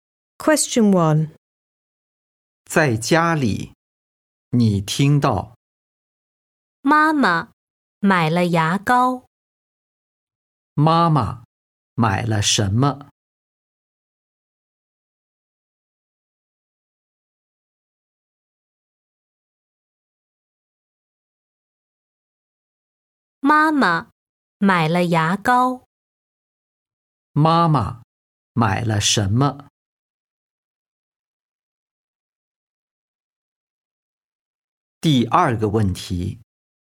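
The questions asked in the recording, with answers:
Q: 妈妈买了什么?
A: 牙膏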